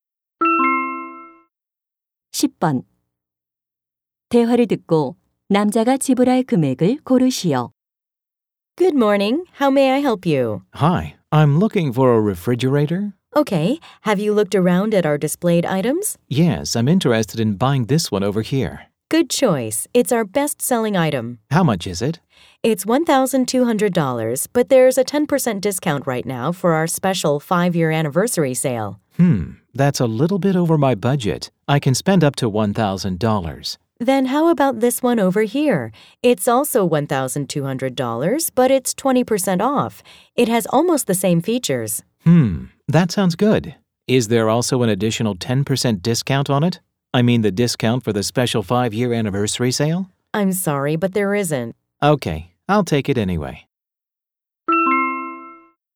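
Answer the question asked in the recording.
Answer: 960달러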